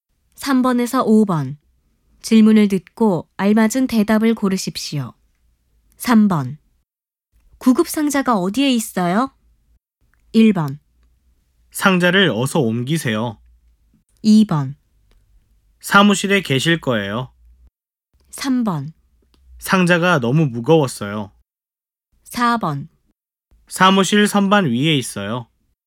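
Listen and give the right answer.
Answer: 4: 사무실 선반 위에 있어요.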